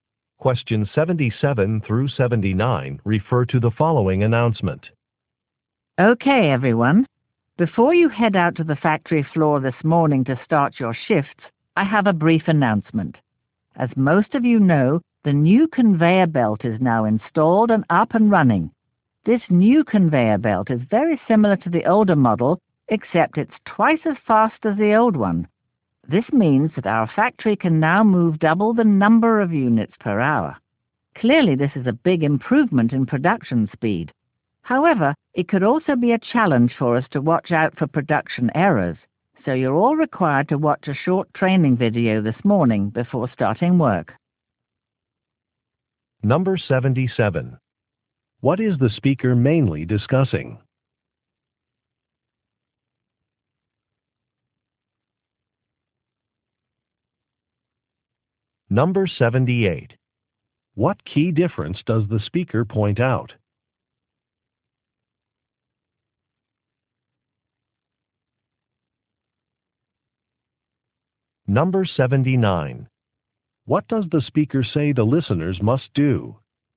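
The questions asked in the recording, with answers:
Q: What is the speaker mainly discussing?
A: A new conveyor belt

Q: What key difference does the speaker point out?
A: It is twice as fast

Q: What does the speaker say the listeners must do?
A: Watch a training video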